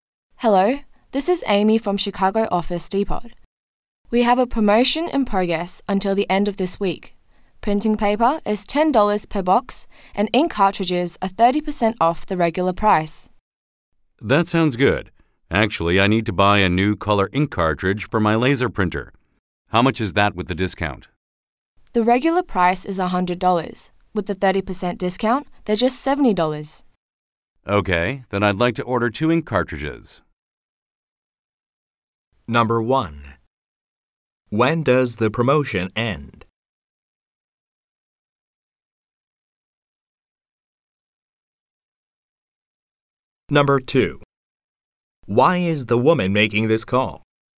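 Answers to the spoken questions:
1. At the end of this week
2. To tell the customer about a promotion on printing paper and ink cartridges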